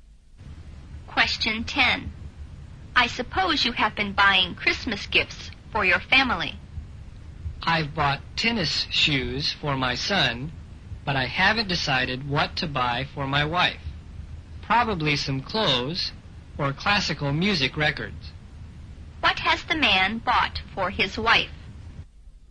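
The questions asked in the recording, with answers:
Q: What has the man bought for his wife?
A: Nothing yet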